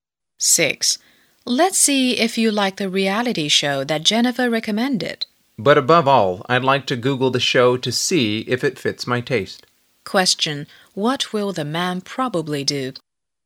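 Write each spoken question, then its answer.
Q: What will the man probably do?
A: Search for the show on Google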